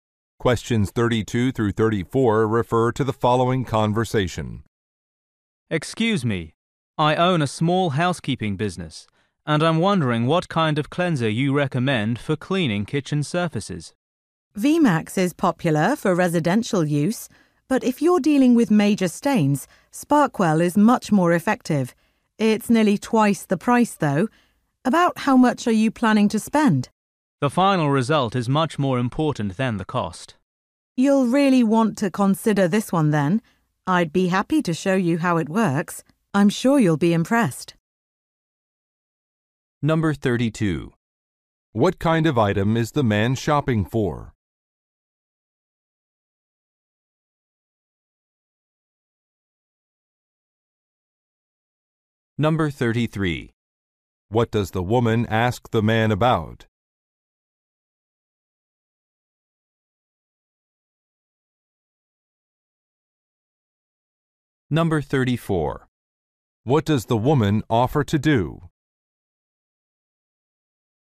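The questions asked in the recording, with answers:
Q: What kind of item is the man shopping for?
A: A cleanser for kitchen surfaces

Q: What does the woman ask the man about?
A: How much he plans to spend

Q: What does the woman offer to do?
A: Show him how the product works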